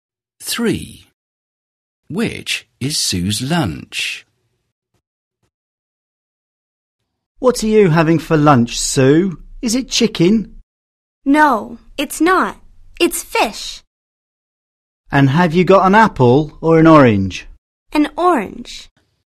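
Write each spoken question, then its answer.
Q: Which is Sue's lunch?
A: Fish and an orange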